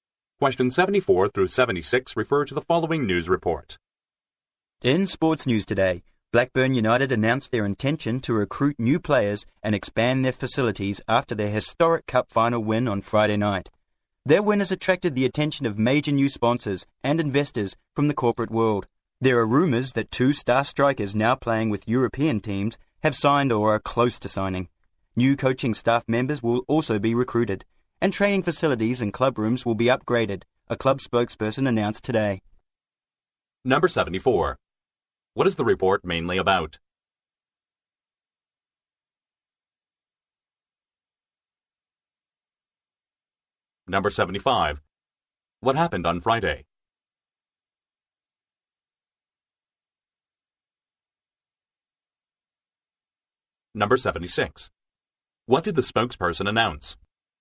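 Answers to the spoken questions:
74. Blackburn United's plans to recruit players and expand facilities
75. Blackburn United won the cup final
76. New coaching staff will be recruited and facilities upgraded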